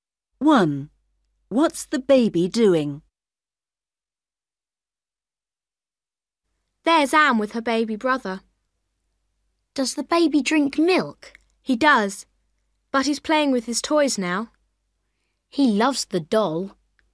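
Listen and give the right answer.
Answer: playing with his toys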